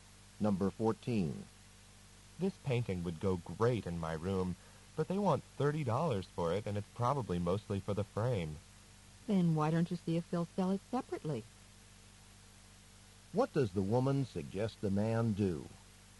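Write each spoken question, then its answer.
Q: What does the woman suggest the man do?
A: Ask whether they will sell the painting without the frame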